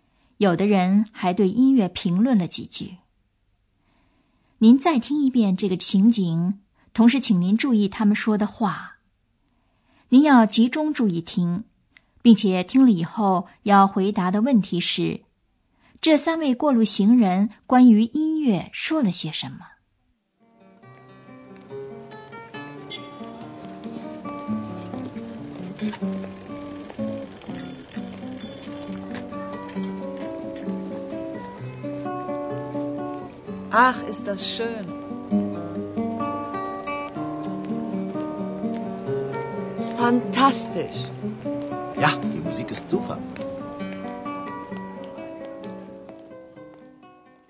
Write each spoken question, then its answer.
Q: 这三位过路行人关于音乐说了些什么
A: 第一位妇女有点陶醉地说:"啊,多美呀!"